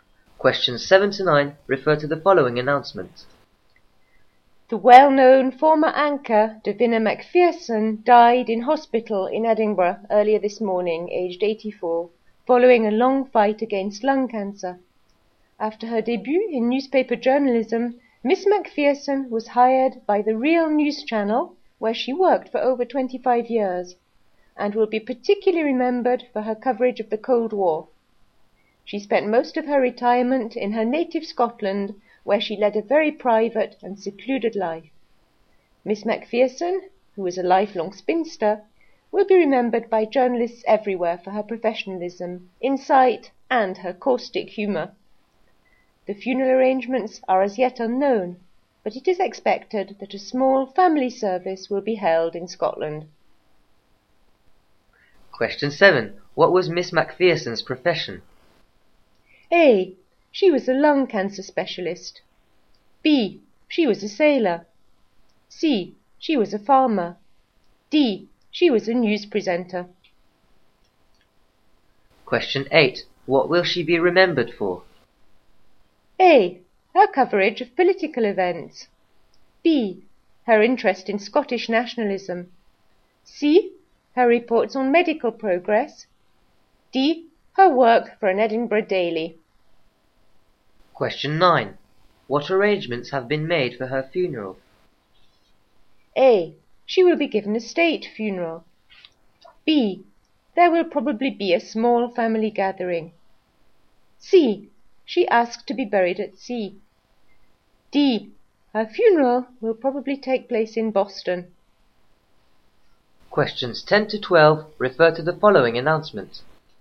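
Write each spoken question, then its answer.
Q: What was Miss MacPherson's profession?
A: D: She was a news presenter.

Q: What will she be remembered for?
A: A: Her coverage of political events.

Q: What arrangements have been made for her funeral?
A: B: There will probably be a small family gathering.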